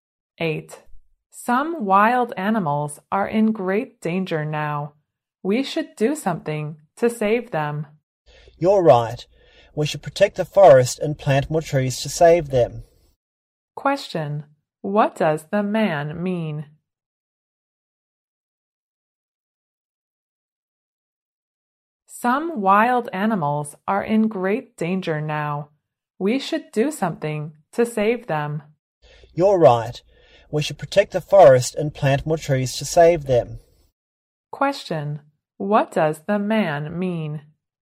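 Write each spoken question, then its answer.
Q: What does the man mean?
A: We should protect the forest and plant more trees to save wild animals.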